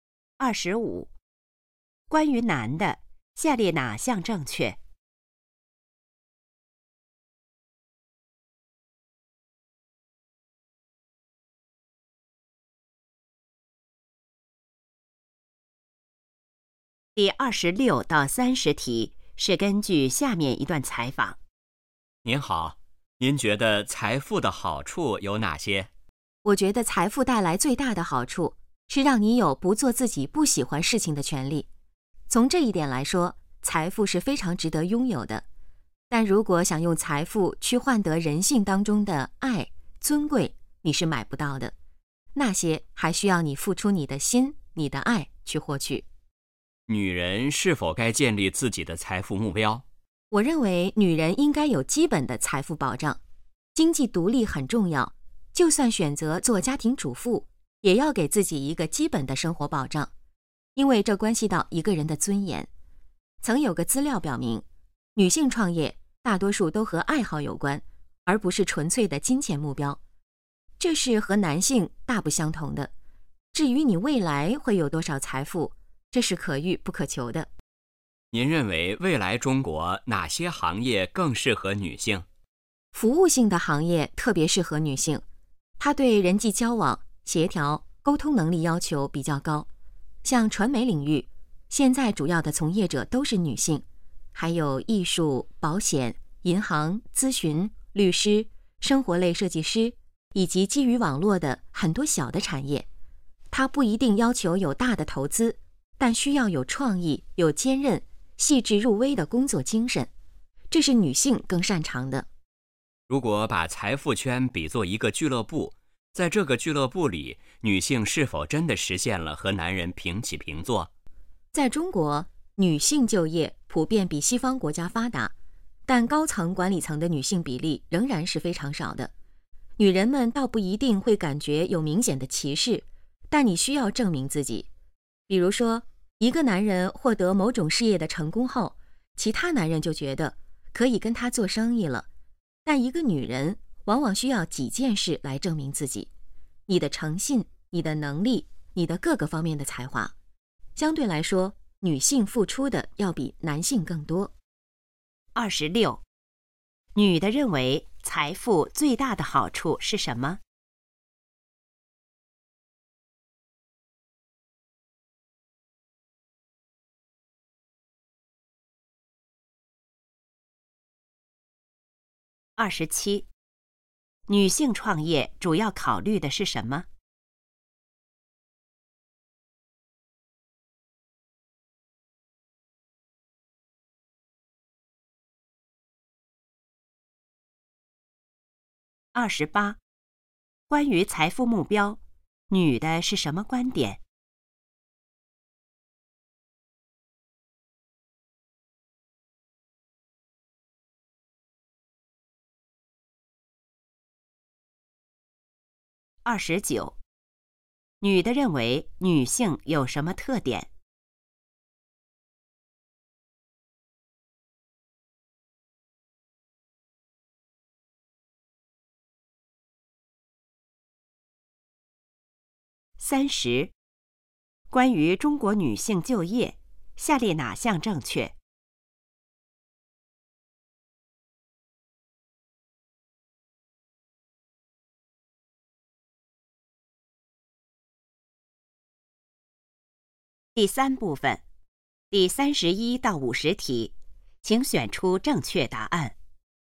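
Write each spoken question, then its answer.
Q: 女的认为财富最大的好处是什么?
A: 让人有不做自己不喜欢事情的权利

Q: 女性创业主要考虑的是什么?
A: 爱好

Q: 关于财富目标,女的是什么观点?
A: 女人应该有基本的财富保障,经济独立很重要

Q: 关于中国女性就业,下列哪项正确?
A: 女性就业比西方发达,但高层管理中女性比例很少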